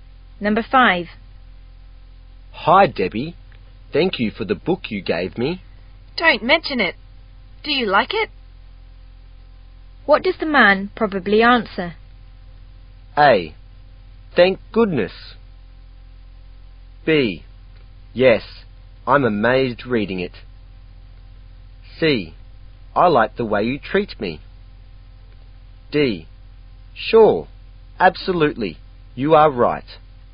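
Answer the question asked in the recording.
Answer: B: Yes, I'm amazed reading it.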